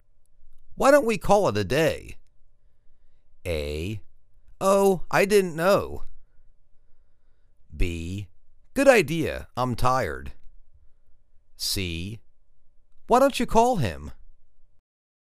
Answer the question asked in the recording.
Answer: Good idea. I'm tired.